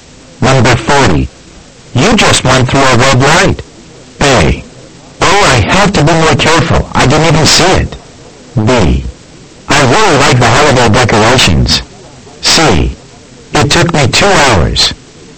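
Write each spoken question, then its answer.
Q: You just went through a red light.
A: A: Oh, I have to be more careful. I didn't even see it.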